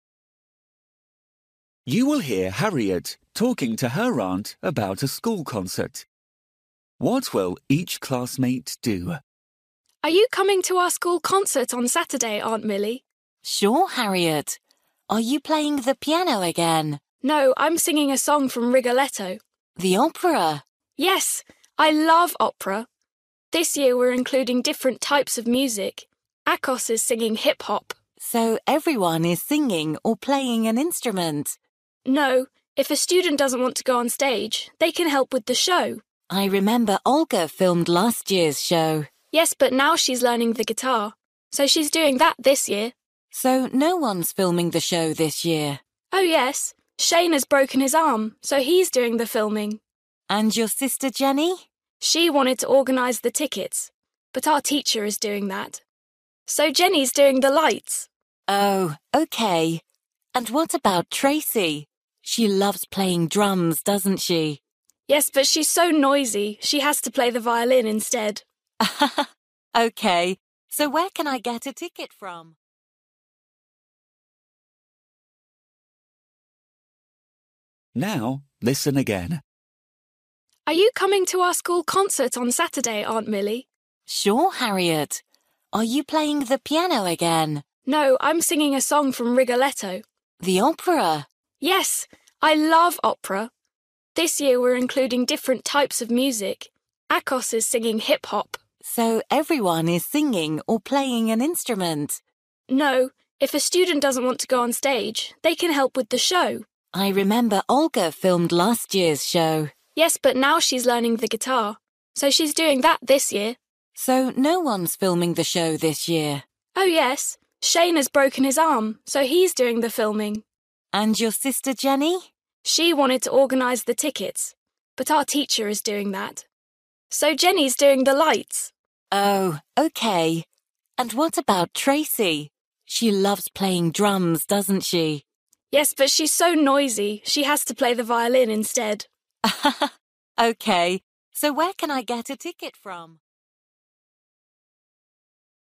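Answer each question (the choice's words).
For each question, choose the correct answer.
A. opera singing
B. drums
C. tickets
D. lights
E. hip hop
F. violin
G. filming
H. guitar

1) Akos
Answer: hip hop

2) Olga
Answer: guitar

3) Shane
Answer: filming

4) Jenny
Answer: lights

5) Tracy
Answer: violin

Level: Luyện nghe trình độ A2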